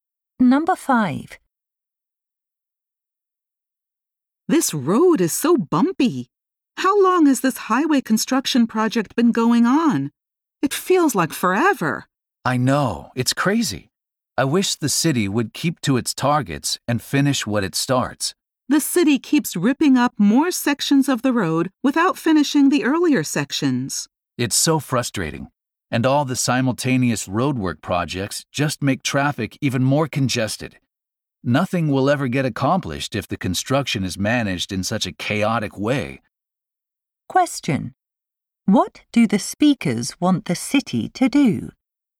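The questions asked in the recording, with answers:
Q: What do the speakers want the city to do?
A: Finish road sections before starting new ones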